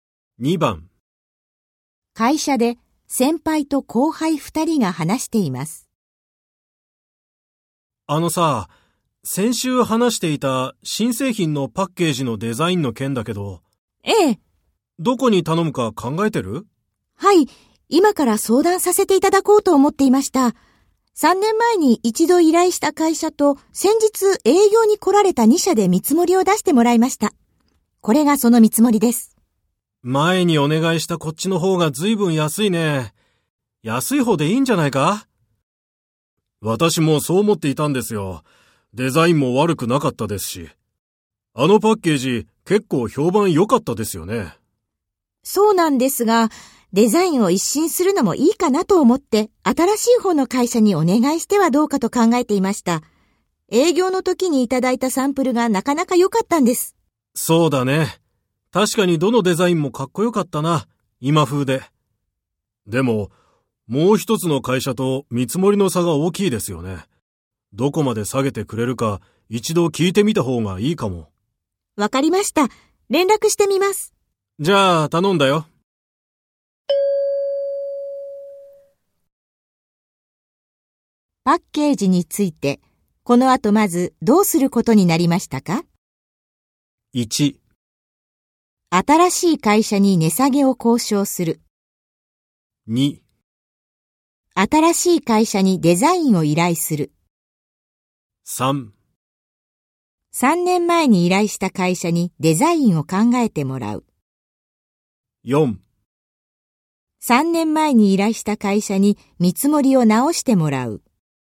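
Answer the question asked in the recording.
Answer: 1: 新しい会社に値下げを交渉する。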